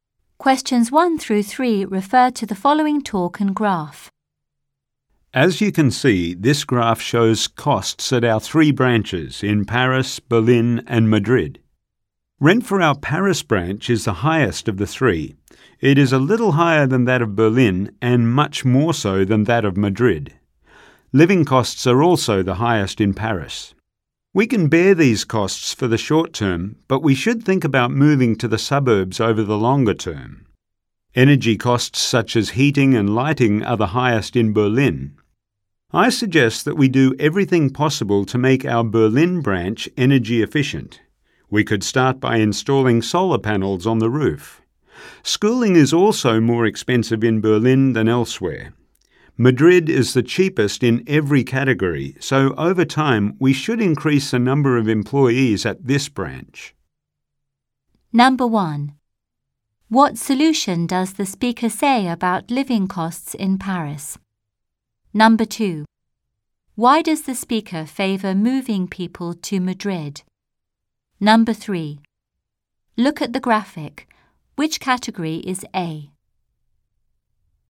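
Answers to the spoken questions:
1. Moving to the suburbs over the longer term
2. Madrid is the cheapest in every category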